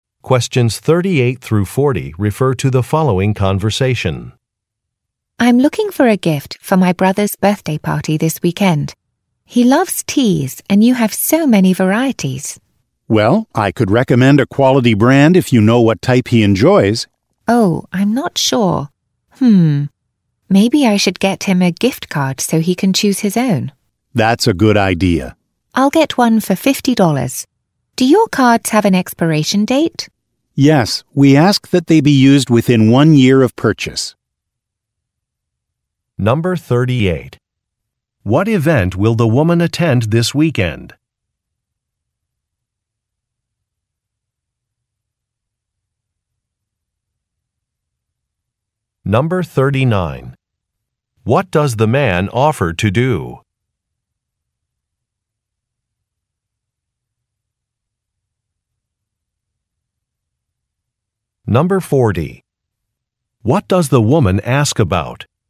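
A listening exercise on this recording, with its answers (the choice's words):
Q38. What event will the woman attend this weekend?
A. A wedding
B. A birthday party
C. A retirement dinner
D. A graduation celebration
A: A birthday party

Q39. What does the man offer to do?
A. Authorize free shipping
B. Apply a discount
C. Provide a sample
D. Make a recommendation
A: Make a recommendation

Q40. What does the woman ask about?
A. An expiration date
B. A manufacturer's guarantee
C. The origin of a product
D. The cost of a product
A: An expiration date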